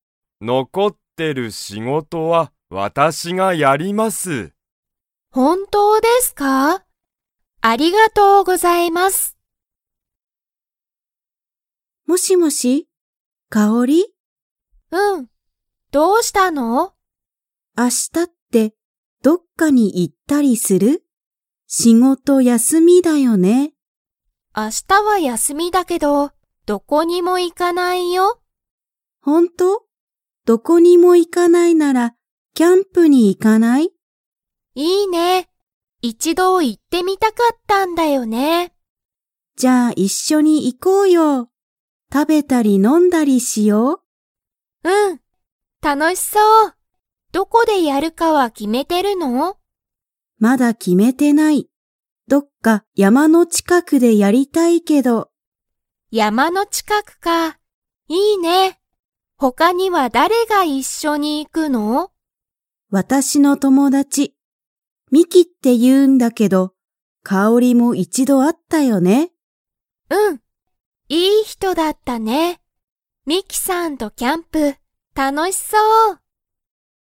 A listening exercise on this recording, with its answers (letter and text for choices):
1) なおみは、____の近(ちか)くでキャンプをやろうと思(おも)っている。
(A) 家(いえ)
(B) 学校(がっこう)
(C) 会社(かいしゃ)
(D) 山(やま)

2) 他(ほか)には誰(だれ)か一緒(いっしょ)にキャンプに行(い)きますか?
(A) はい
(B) いいえ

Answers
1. (D) 山(やま)
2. (A) はい

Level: Level 2